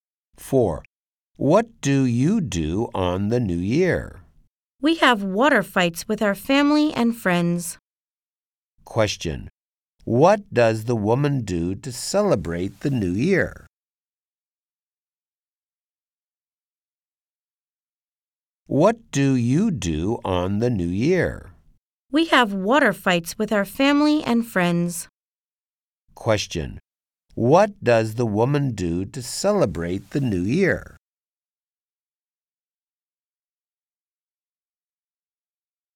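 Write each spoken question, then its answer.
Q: Question. What does the woman do to celebrate the New Year?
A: She has water fights with her family and friends.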